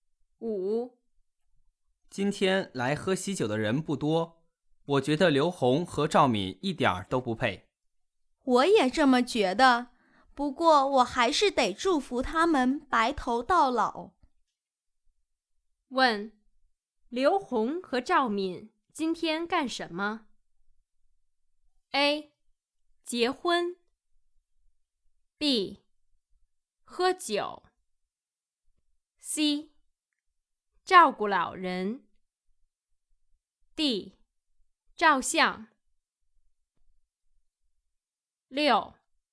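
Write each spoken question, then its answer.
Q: 问,刘红和赵敏今天干什么?A. 结婚 B. 喝酒 C. 照顾老人 D. 照相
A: A: 结婚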